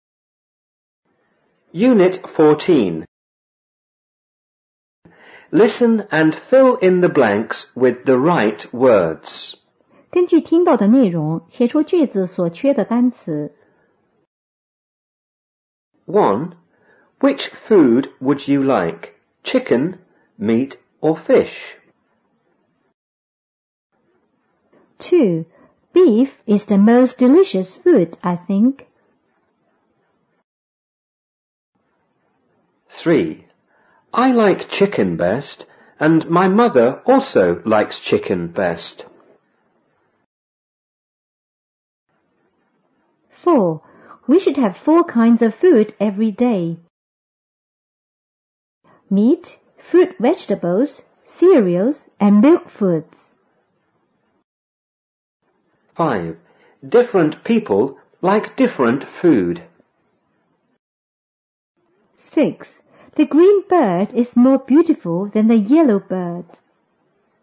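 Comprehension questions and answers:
1.Listen and fill in the blanks with the right words.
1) Which food____you like,_____,Meat or fish?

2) Beef is the____delicious food,I____.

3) We____have four kinds of_____every day,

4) ____people like____food.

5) The green bird is_____ ______than the yellow bird.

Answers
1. would; Chicken
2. most; think
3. should; food
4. Different; different
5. more beautiful

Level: 五年级下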